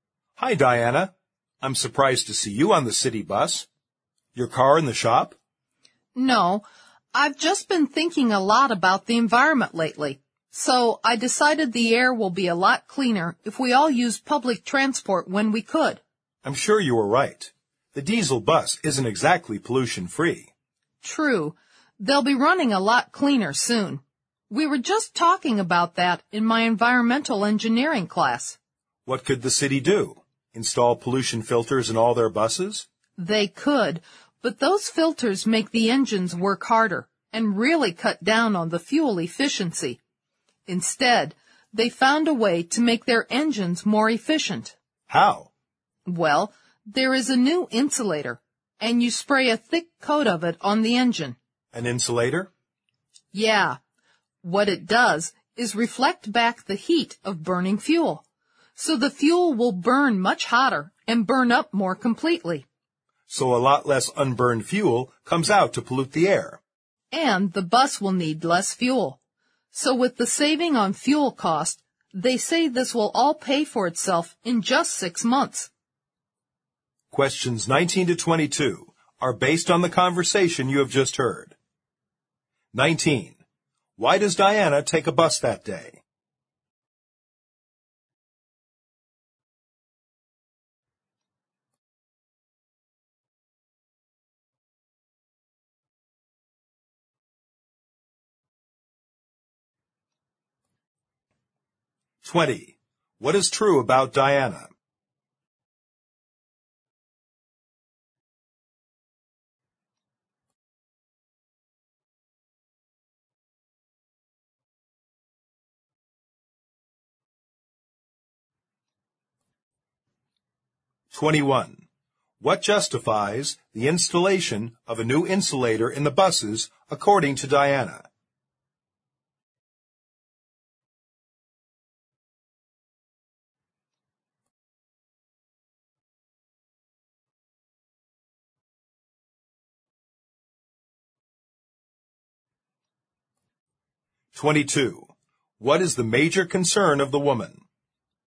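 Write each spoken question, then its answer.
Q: Why does Diana take a bus that day?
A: She is concerned about the environment and wants cleaner air

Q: What justifies the installation of a new insulator in the buses according to Diana?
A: It saves fuel and pays for itself in 6 months

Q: What is the major concern of the woman?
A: The environment and air pollution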